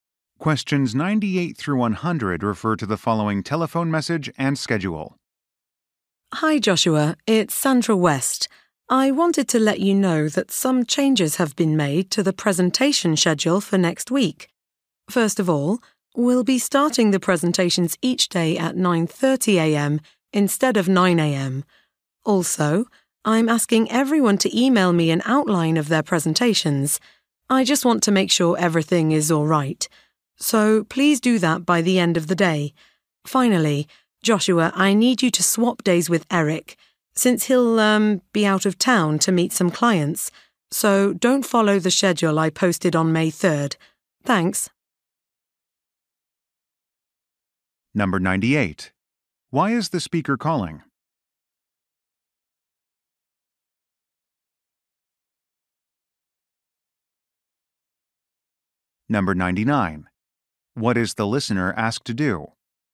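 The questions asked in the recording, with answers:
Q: Why is the speaker calling?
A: To announce changes to the presentation schedule

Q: What is the listener asked to do?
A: Email an outline of his presentation by end of day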